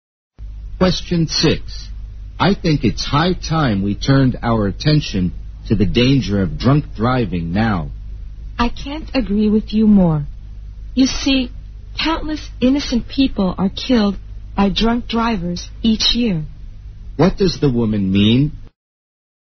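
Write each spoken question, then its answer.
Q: What does the woman mean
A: She fully agrees that drunk driving needs attention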